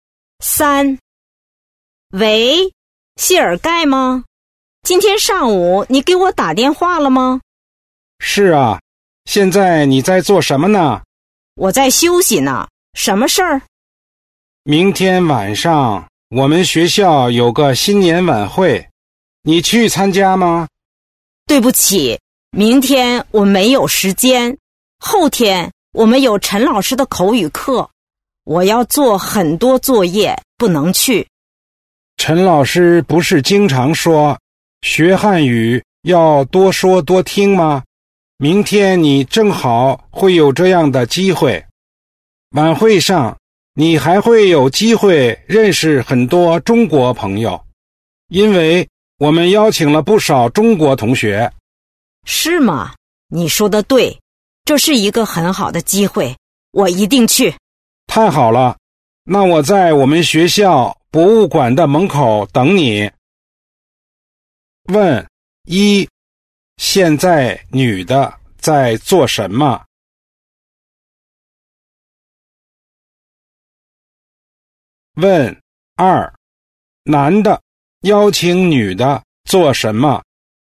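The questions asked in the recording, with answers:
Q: 现在女的在做什么?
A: 在休息

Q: 男的邀请女的做什么?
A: 参加新年晚会

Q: 他们在哪儿见面?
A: 学校博物馆的门口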